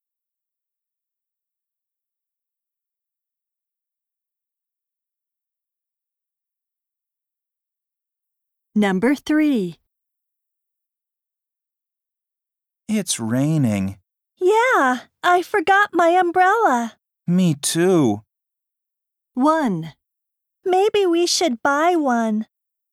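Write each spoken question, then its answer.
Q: Me too.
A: 1: Maybe we should buy one.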